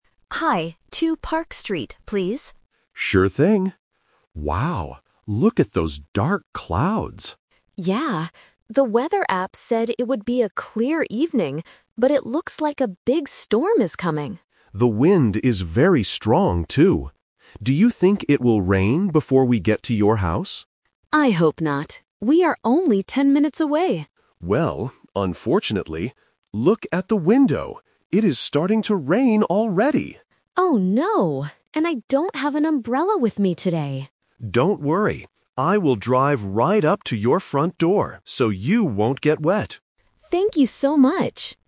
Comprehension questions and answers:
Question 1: What did the weather app say about this evening?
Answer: It would be a clear evening.

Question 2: What happens while they are talking in the taxi?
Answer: It starts to rain.

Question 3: How will the driver help the passenger?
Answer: By driving very close to the front door.

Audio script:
Driver: Sure thing. Wow, look at those dark clouds!
Passenger: Yeah. The weather app said it would be a clear evening, but it looks like a big storm is coming.
Driver: The wind is very strong, too. Do you think it will rain before we get to your house?
Passenger: I hope not. We are only ten minutes away.
Driver: Well, unfortunately... look at the window. It is starting to rain already!
Passenger: Oh no! And I don't have an umbrella with me today.
Driver: Don't worry. I will drive right up to your front door so you won't get wet.